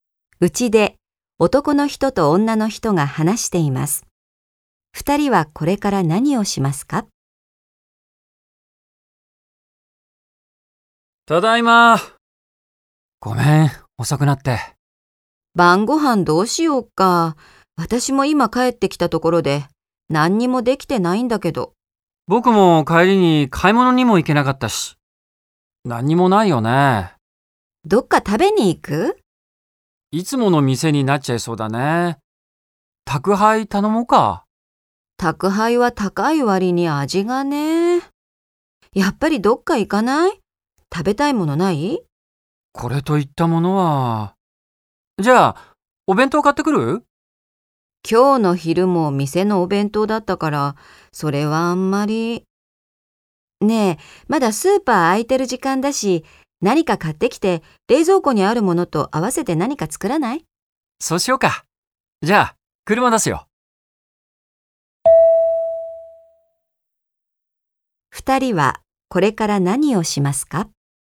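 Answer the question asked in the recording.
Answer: スーパーで買い物をして、冷蔵庫にあるものと合わせて晩ご飯を作る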